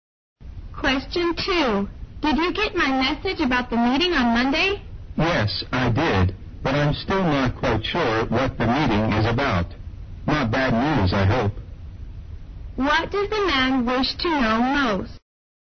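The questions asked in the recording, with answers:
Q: What does the man wish to know most?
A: What the meeting is about.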